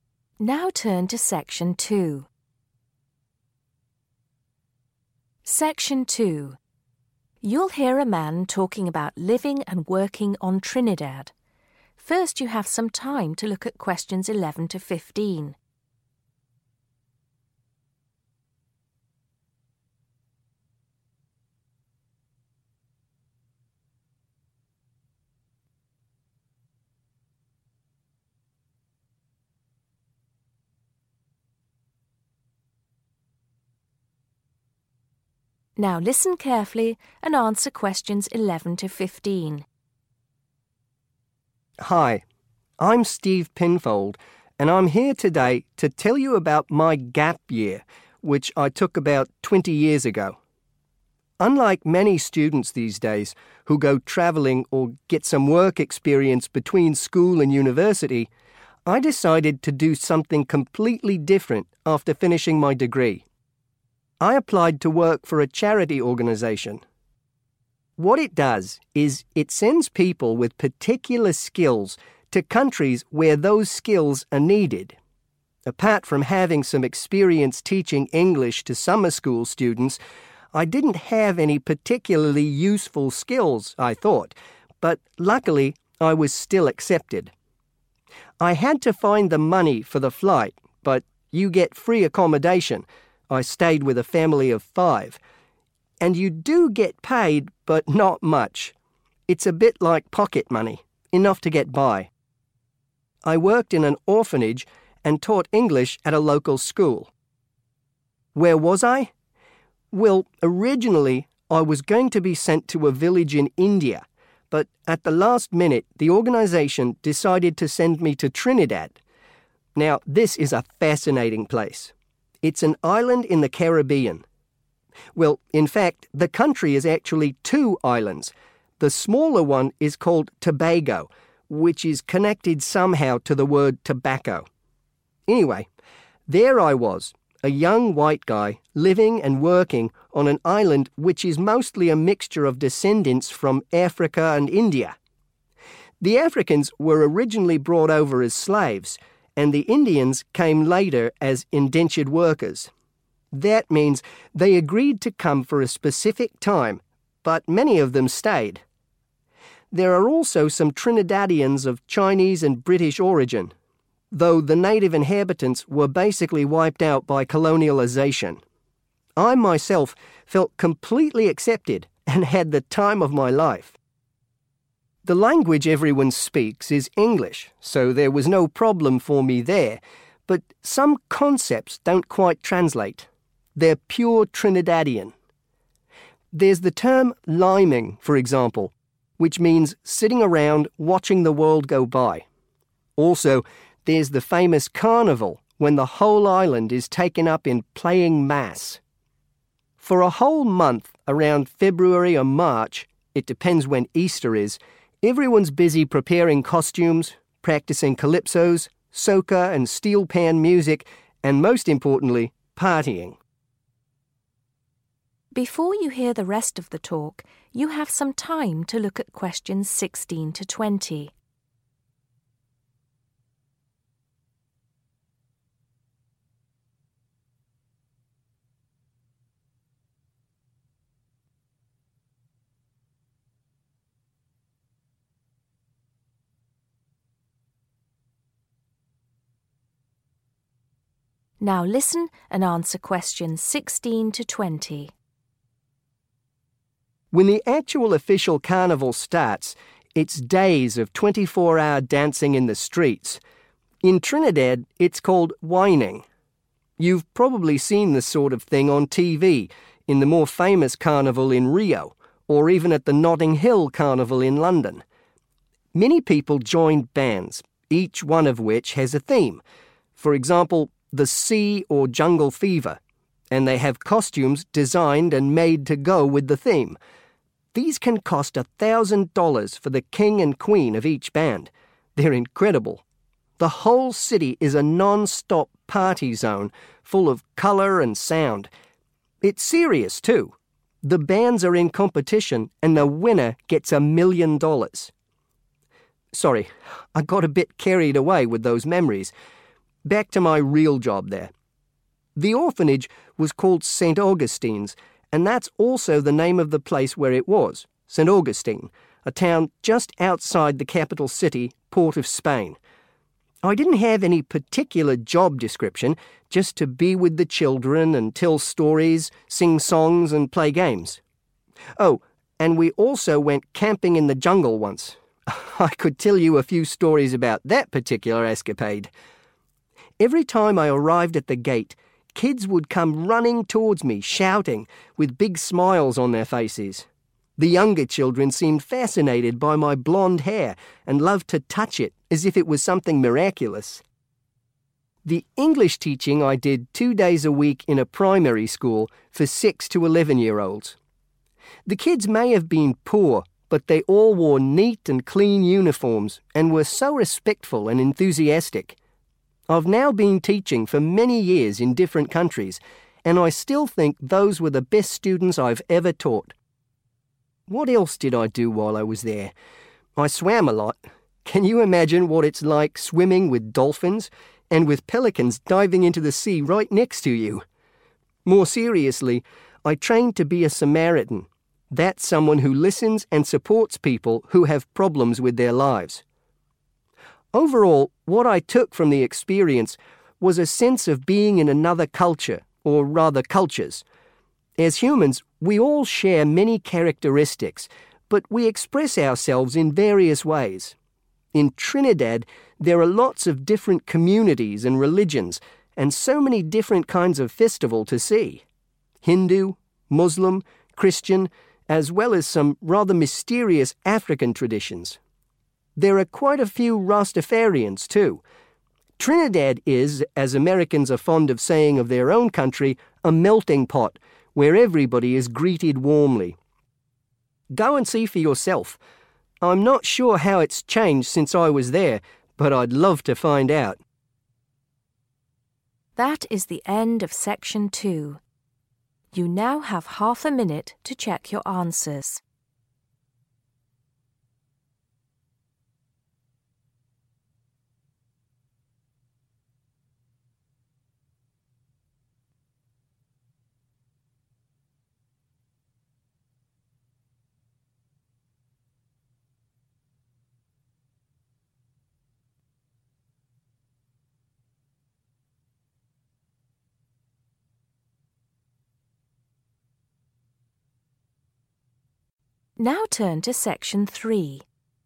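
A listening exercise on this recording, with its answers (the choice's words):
Choose the correct letter. A, B or C.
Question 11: Steve Penfold did voluntary service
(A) before university.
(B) during university.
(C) after university.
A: after university.

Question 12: Steve had to pay for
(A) his travel.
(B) his accommodation.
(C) his day-to-day expenses.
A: his travel.

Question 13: Where did the charity organisation want to send Steve at first?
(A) Trinidad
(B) India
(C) Tobago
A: India

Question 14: What does Steve say about the population of Trinidad?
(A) There are more people of Indian descent than African.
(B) The majority are descendants of slaves.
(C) There are several different ethnic groups.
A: There are several different ethnic groups.

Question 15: Steve says that some language terms in Trinidad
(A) are not connected to the English language.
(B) have meanings that have a local origin.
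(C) are from other carnivals around the world.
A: have meanings that have a local origin.

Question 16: How much money does the best carnival group get?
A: $1,000,000

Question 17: Where did Steve take the children camping?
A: in the jungle

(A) were of varying types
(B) express various emotions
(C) had a connection with dolphins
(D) showed respect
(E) had many problems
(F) try to help people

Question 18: The students ...........................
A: showed respect

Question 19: The Samaritans .........................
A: try to help people

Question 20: The festivals ......................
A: were of varying types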